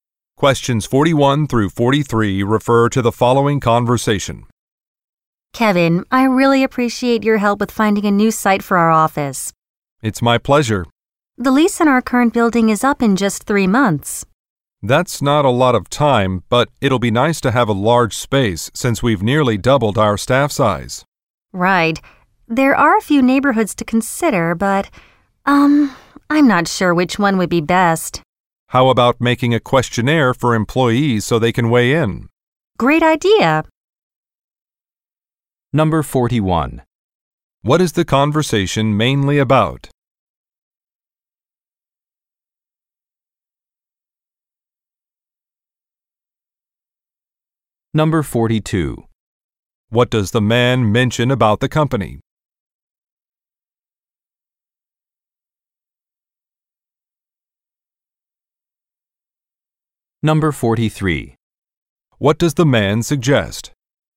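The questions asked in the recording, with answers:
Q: What is the conversation mainly about?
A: Finding a new office location

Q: What does the man mention about the company?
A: Its staff has nearly doubled

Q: What does the man suggest?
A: Making a questionnaire for employees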